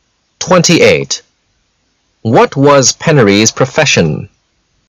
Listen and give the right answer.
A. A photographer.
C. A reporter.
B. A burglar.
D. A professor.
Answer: B. A burglar.

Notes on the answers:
信息明示题。文章最后指出,he was the most accomplished burglar,由此可知Penury是个夜贼,所以B正确。